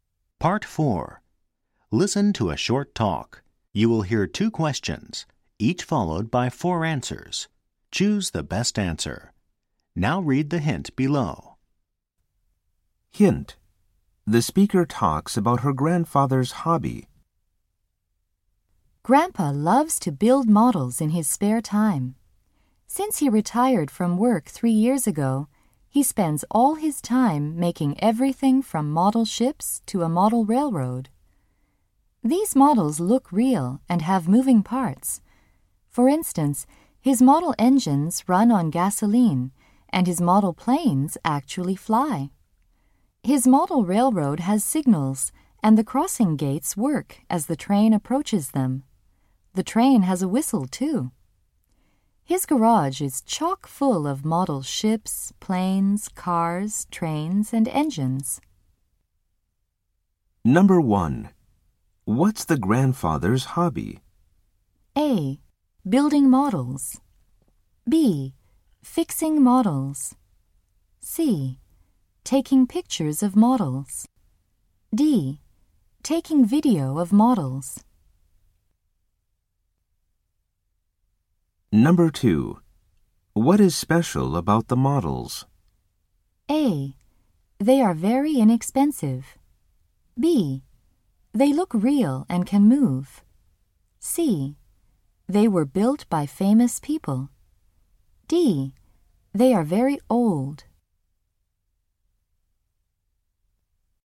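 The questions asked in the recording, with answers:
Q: What's the grandfather's hobby?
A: A: Building models.

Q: What is special about the models?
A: B: They look real and can move.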